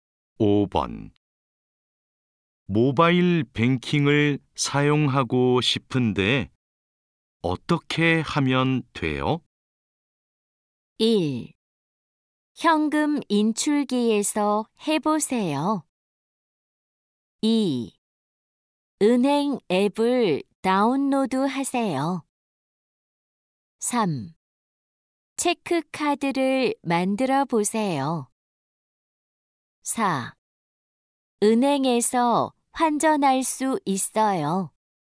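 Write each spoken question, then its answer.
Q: 모바일 뱅킹을 사용하고 싶은데 어떻게 하면 돼요?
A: 2: 은행 앱을 다운로드 하세요.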